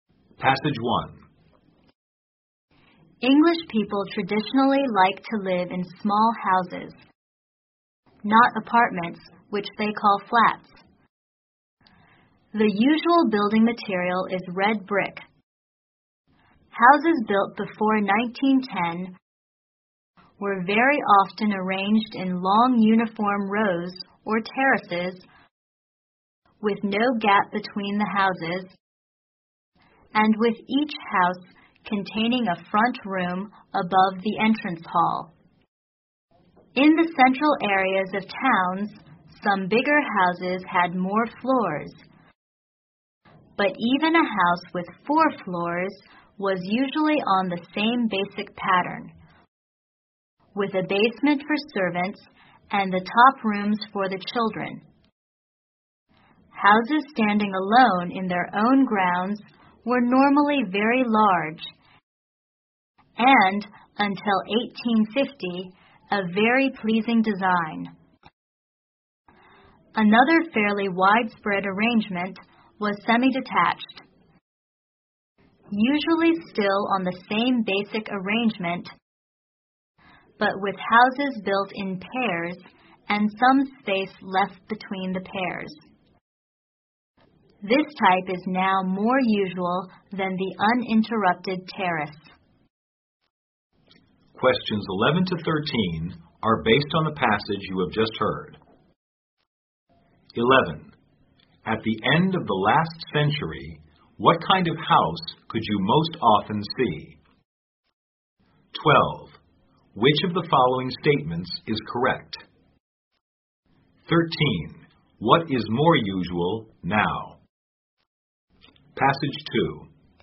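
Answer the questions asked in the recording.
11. Houses in long uniform rows, or terraces
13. Semi-detached houses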